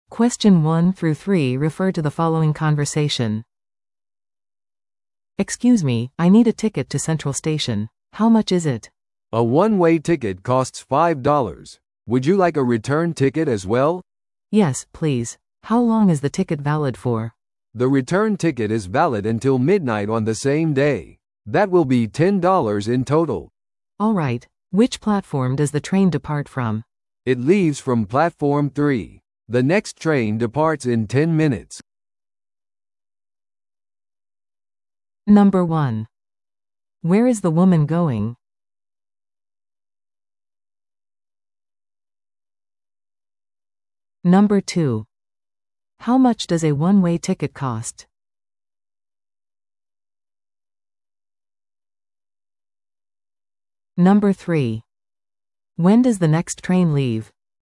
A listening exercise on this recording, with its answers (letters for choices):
Listen to the audio below and answer the questions.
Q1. Where is the woman going?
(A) セントラル駅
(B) 空港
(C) 市役所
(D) ショッピングモール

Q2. How much does a one-way ticket cost?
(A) 3ドル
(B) 5ドル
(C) 7ドル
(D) 10ドル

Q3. When does the next train leave?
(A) 5分後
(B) 10分後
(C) 20分後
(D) 30分後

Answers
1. A
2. B
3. B